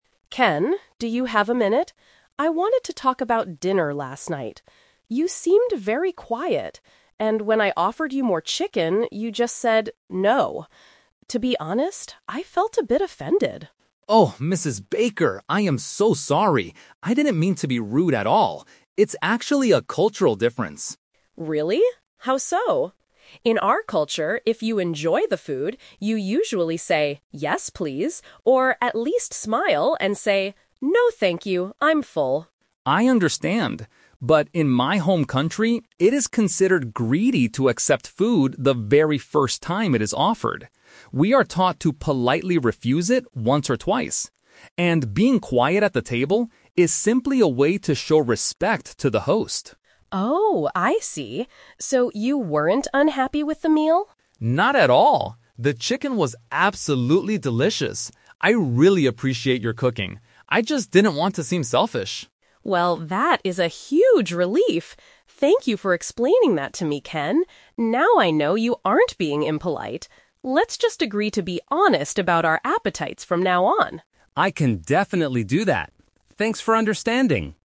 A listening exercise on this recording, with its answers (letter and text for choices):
Listen to a conversation between a host mother and an international student. For each question, choose the correct answer A, B, or (C).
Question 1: Why was Mrs. Baker upset with Ken after dinner?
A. He told her directly that he did not like her cooking.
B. He refused her offer of extra food without being polite.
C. He ate too much of the chicken without sharing it.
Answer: B. He refused her offer of extra food without being polite.

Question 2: According to Ken, what does being quiet at the dinner table mean in his culture?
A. It shows that you have a deep respect for the cook.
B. It means that you are feeling very shy and nervous.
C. It shows that you want the host to offer you more food.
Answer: A. It shows that you have a deep respect for the cook.

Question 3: How do they agree to solve this problem for the future?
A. Ken will start cooking his own traditional meals.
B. Mrs. Baker will stop offering Ken extra portions of food.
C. They will be straightforward about how hungry they are.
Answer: C. They will be straightforward about how hungry they are.

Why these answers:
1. Mrs. Baker says that when she offered him more chicken, he "just said 'No'" and she felt "offended." Saying a flat "No" without a "thank you" is seen as refusing without being polite.
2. Ken explains that "being quiet at the table is simply a way to show respect to the host." The cook (Mrs. Baker) is the host.
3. Mrs. Baker suggests, "Let's just agree to be honest about our appetites from now on!" and Ken agrees. Being "straightforward" means being honest, and "appetite" relates to how hungry you are.

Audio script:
Mrs. Baker: Ken, do you have a minute? I wanted to talk about dinner last night. You seemed very quiet, and when I offered you more chicken, you just said "No." To be honest, I felt a bit offended.
Ken: Oh, Mrs. Baker, I am so sorry! I didn't mean to be rude at all. It's actually a cultural difference.
Mrs. Baker: Really? How so? In our culture, if you enjoy the food, you usually say "Yes, please" or at least smile and say "No, thank you, I'm full."
Ken: I understand. But in my home country, it is considered greedy to accept food the very first time it is offered. We are taught to politely refuse it once or twice. And being quiet at the table is simply a way to show respect to the host.
Mrs. Baker: Oh, I see! So you weren't unhappy with the meal?
Ken: Not at all! The chicken was absolutely delicious. I really appreciate your cooking. I just didn't want to seem selfish.
Mrs. Baker: Well, that is a huge relief! Thank you for explaining that to me, Ken. Now I know you aren't being impolite. Let's just agree to be honest about our appetites from now on!